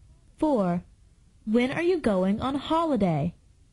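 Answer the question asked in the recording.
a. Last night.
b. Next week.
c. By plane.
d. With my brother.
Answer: b. Next week.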